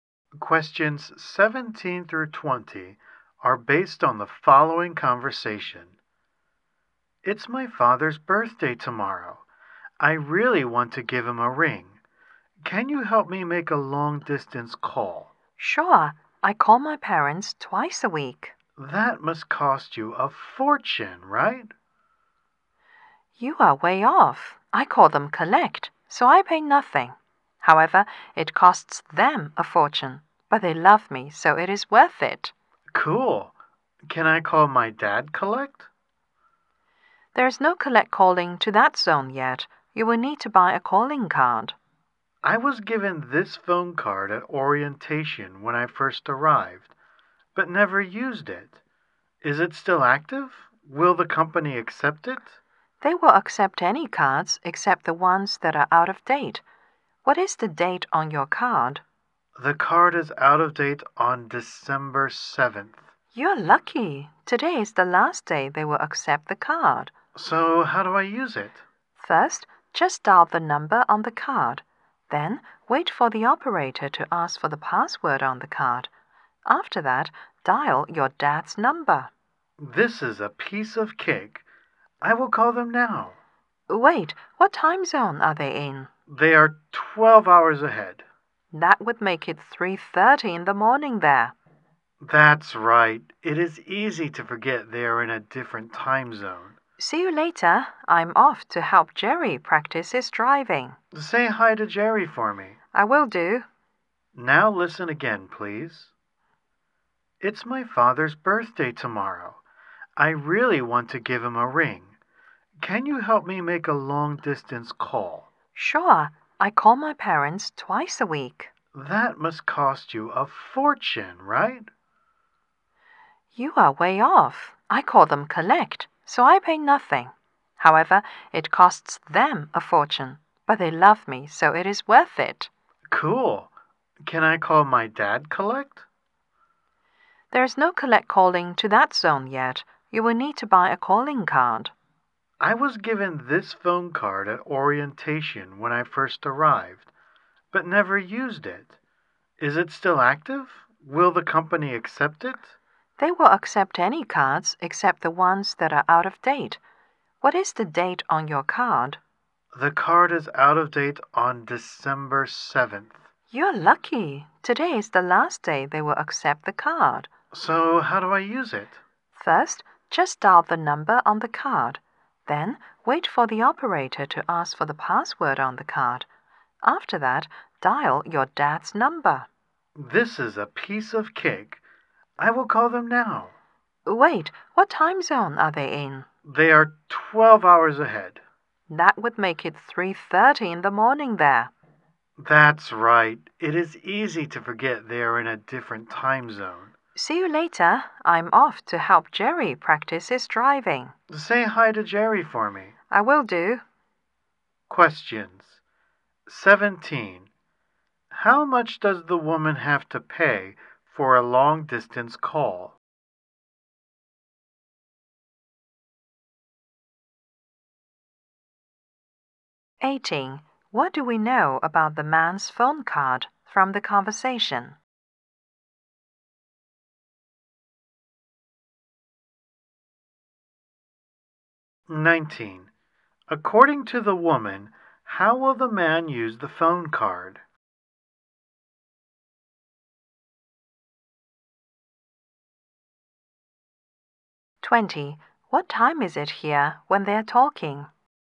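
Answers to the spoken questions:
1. Nothing
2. Today is the last day it will be accepted
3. Dial the card number, give the password, then dial his dad's number
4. 3:30 in the afternoon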